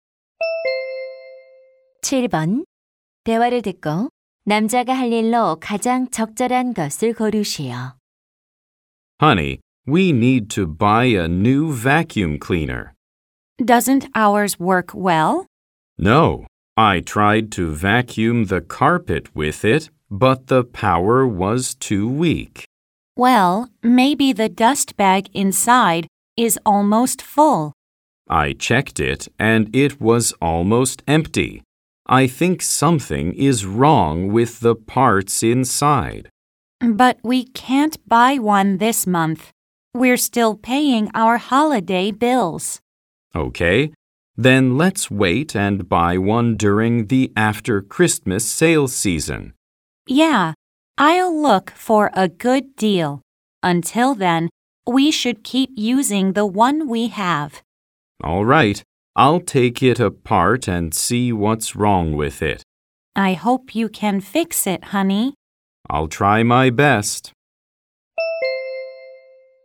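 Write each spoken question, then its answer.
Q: 대화를 듣고 남자가 할 일로 가장 적절한 것을 고르시오.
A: 진공청소기를 분해해서 고장 난 곳 확인하기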